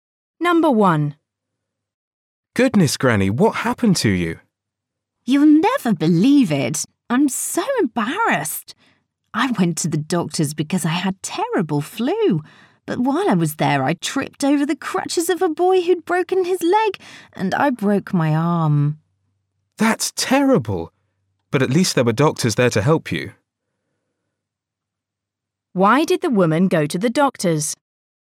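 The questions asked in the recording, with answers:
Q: Why did the woman go to the doctor's?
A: She had terrible flu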